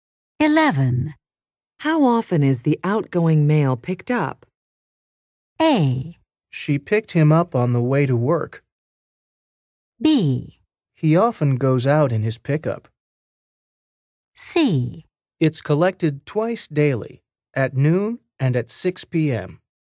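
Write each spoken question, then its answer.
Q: How often is the outgoing mail picked up?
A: C: It's collected twice daily, at noon and at 6 p.m.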